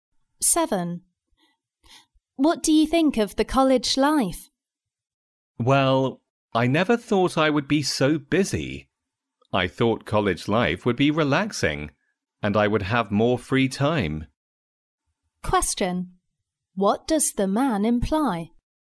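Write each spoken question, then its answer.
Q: What does the man imply?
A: College life is busier than he expected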